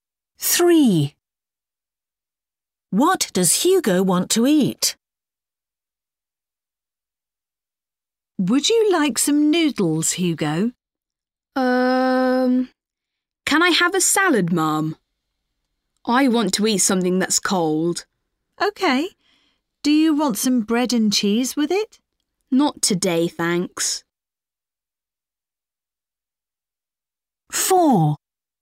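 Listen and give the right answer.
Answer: A salad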